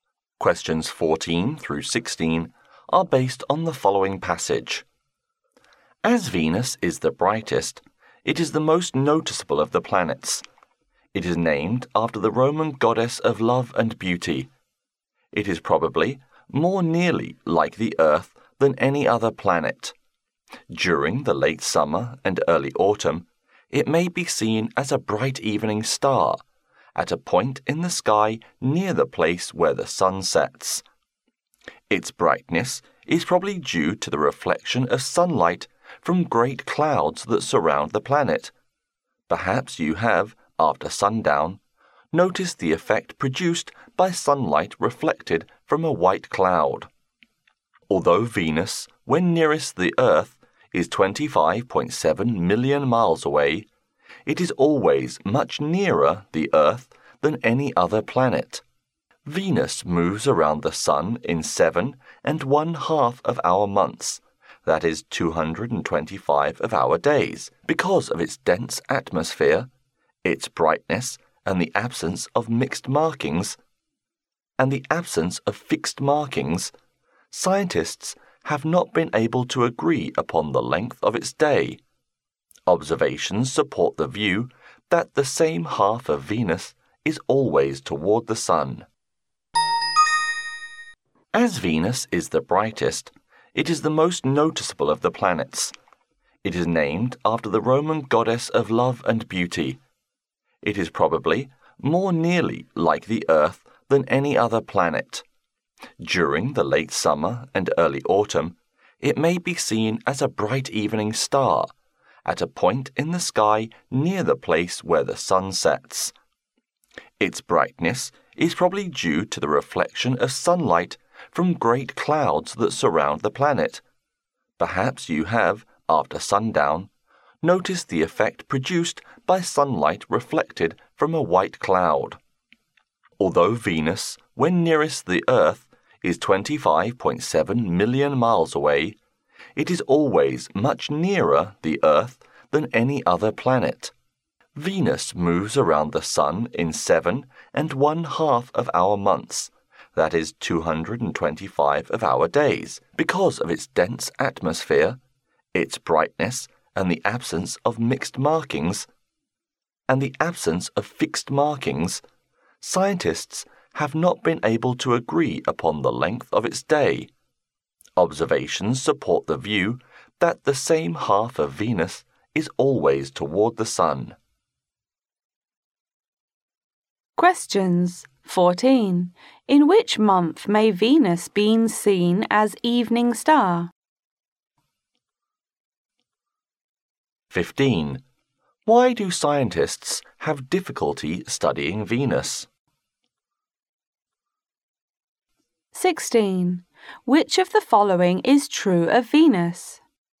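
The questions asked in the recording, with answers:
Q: Why do scientists have difficulty studying Venus?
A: Because of its dense atmosphere, its brightness and its lack of fixed markings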